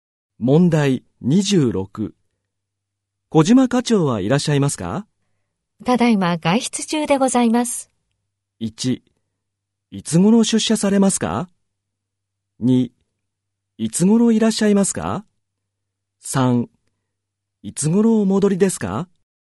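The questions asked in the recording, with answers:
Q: 小島課長はいらっしゃいますか?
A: 3: いつ頃お戻りですか?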